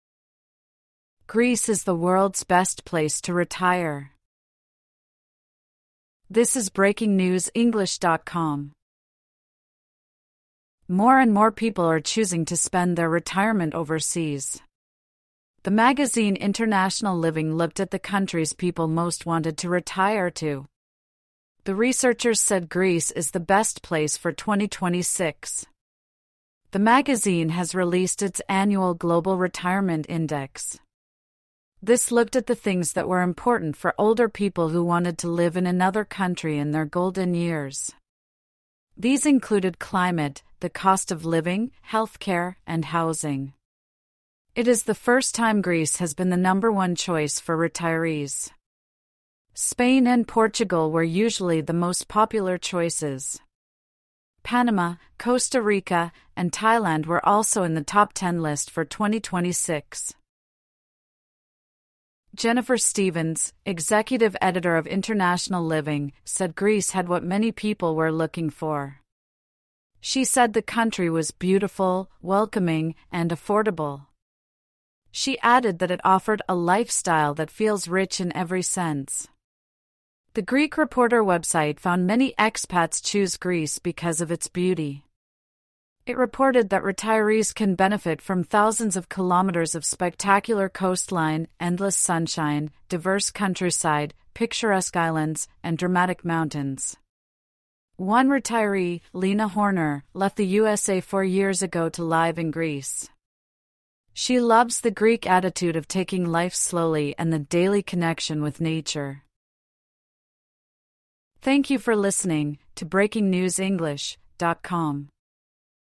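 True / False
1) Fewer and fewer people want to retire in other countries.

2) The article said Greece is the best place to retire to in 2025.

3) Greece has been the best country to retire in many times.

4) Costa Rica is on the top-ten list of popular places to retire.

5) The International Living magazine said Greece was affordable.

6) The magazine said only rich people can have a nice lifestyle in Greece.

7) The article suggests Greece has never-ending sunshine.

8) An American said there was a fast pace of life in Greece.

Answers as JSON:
{"1": "F", "2": "F", "3": "F", "4": "T", "5": "T", "6": "F", "7": "T", "8": "F"}

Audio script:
(1/14) Greece is the world's best place to retire
More and more people are choosing to spend their retirement overseas. The magazine International Living looked at the countries people most wanted to retire to. The researchers said Greece is the best place for 2026. 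The magazine has released its Annual Global Retirement Index. This looked at the things that were important for older people who wanted to live in another country in their golden years. These included climate, the cost of living, healthcare, and housing. It is the first time Greece has been the number-one choice for retirees. Spain and Portugal were usually the most popular choices. Panama, Costa Rica, and Thailand were also in the top-ten list for 2026.
Jennifer Stevens, £åxecutive editor of International Living, said Greece had what many people were looking for. She said the country was "beautiful, welcoming, and affordable". She added that it offered "a lifestyle that feels rich in every sense". The Greek Reporter website found many expats choose Greece because of its beauty. It reported that retirees can benefit from thousands of kilometres of spectacular coastline, endless sunshine, diverse countryside, picturesque islands, and dramatic mountains. 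One retiree, Leena Horner, left the USA four years ago to live in Greece. She loves the Greek attitude of taking life slowly and the "daily connection with nature".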